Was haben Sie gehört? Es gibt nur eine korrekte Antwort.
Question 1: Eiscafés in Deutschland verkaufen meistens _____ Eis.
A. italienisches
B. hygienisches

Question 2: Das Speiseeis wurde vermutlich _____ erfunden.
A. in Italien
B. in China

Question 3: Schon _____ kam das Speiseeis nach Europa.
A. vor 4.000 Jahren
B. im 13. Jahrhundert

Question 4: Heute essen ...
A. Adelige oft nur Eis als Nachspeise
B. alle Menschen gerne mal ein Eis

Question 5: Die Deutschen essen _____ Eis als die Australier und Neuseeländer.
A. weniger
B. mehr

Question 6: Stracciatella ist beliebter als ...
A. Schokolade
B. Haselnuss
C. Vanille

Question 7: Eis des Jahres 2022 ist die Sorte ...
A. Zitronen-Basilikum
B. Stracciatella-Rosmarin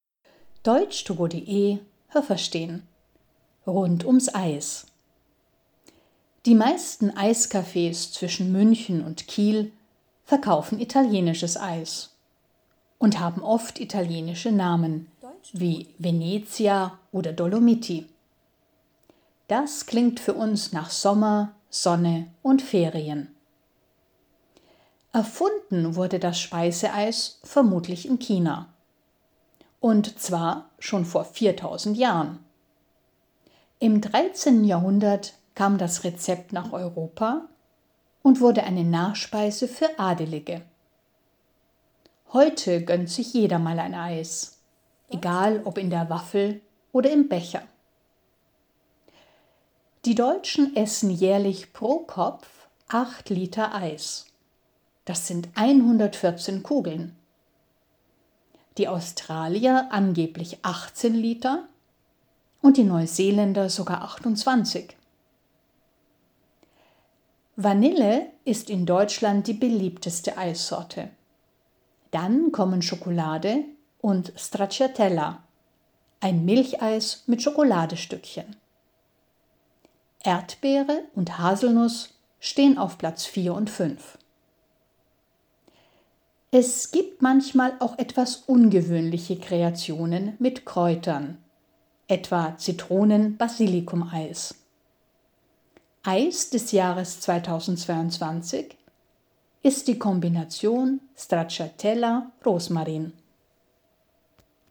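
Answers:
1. italienisches
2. in China
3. im 13. Jahrhundert
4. alle Menschen gerne mal ein Eis
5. weniger
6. Haselnuss
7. Stracciatella-Rosmarin

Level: A2

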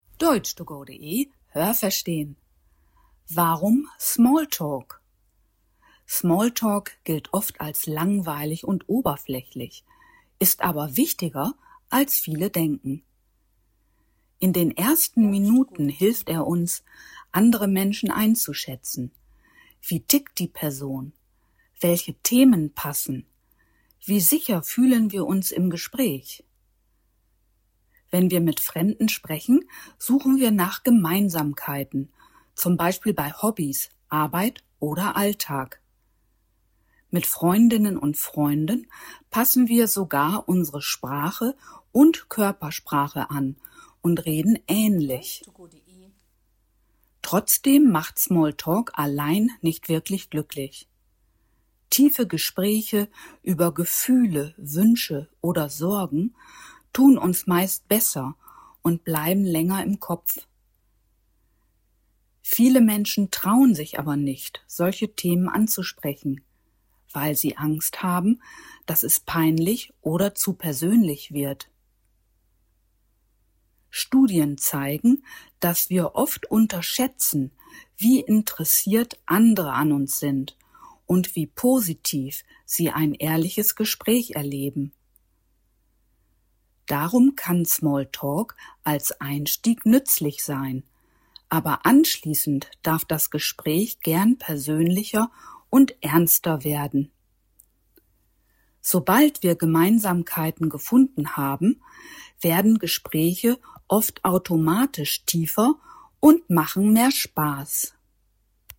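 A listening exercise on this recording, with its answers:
Was haben Sie gehört? Es gibt nur eine korrekte Antwort.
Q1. Welche Funktion hat Small Talk laut Text vor allem in den ersten Minuten eines Gesprächs?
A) Er dient hauptsächlich dazu, unangenehme Pausen mit beliebigen Themen zu füllen.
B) Er hilft, das Gegenüber einzuschätzen und passende Themen zu finden.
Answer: Er hilft, das Gegenüber einzuschätzen und passende Themen zu finden.

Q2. Was sagt der Text über unser Verhalten gegenüber Freundinnen und Freunden im Gespräch?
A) Wir bemühen uns, möglichst anders zu sprechen, um unsere Individualität zu betonen.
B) Wir gleichen Sprache und Körpersprache einander an, was Nähe und Vertrautheit zeigt.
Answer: Wir gleichen Sprache und Körpersprache einander an, was Nähe und Vertrautheit zeigt.

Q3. Welche Aussage beschreibt das Verhältnis von Small Talk zu unserem Wohlbefinden am treffendsten?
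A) Small Talk allein reicht nicht aus, um langfristig zufrieden zu sein.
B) Small Talk macht Menschen grundsätzlich glücklicher als andere Gesprächsformen.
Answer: Small Talk allein reicht nicht aus, um langfristig zufrieden zu sein.

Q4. Warum bleiben tiefere Gespräche den Menschen laut Text eher im Gedächtnis?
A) Weil sie sich auf persönliche Themen wie Gefühle, Wünsche oder Sorgen beziehen.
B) Weil sie meist über neutrale Themen wie Wetter oder Alltagsorganisation geführt werden.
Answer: Weil sie sich auf persönliche Themen wie Gefühle, Wünsche oder Sorgen beziehen.

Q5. Warum trauen sich Menschen oft nicht, ein Gespräch zu vertiefen?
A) Aus Sorge, das Gegenüber sprachlich nicht verstehen zu können.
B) Aus Angst, zu privat zu werden oder eine peinliche Situation zu erzeugen.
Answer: Aus Angst, zu privat zu werden oder eine peinliche Situation zu erzeugen.

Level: B2

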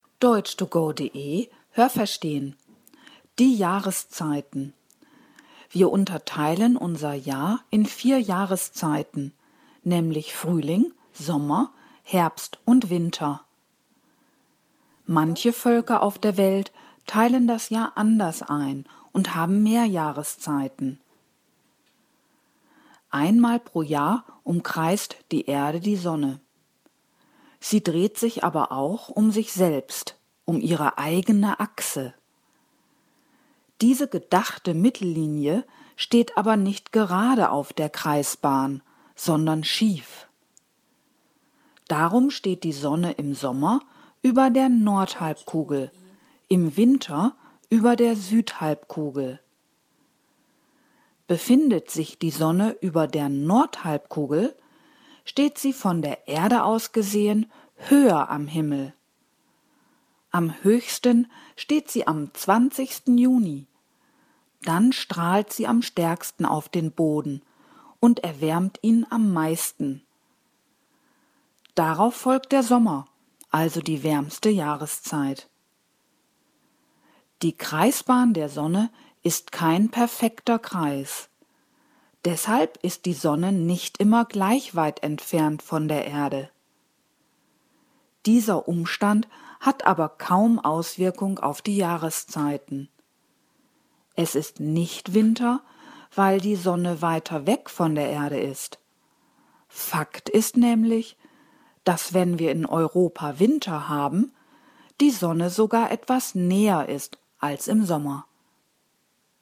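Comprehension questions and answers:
Was haben Sie gehört? Es gibt nur eine korrekte Antwort.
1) Die Einteilung in vier Jahreszeiten ist ...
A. auf der ganzen Welt gleich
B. nicht überall die Regel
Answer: nicht überall die Regel

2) Einmal pro Jahr umkreist ...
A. die Sonne die Erde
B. die Erde die Sonne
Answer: die Erde die Sonne

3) Die Erde dreht sich auch um die ...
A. Nord- und Südhalbkugel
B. eigene Achse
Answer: eigene Achse

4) Die als Mittellinie gedachte Erdachse ist ...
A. schief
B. kreisförmig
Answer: schief

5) Die Sonne steht im Sommer über der ...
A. Nordhalbkugel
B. Südhalbkugel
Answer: Nordhalbkugel

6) Wenn sich die Sonne über der Nordhalbkugel befindet, ...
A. steht sie höher am Himmel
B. erwärmt sie den Boden nicht so stark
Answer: steht sie höher am Himmel

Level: C1

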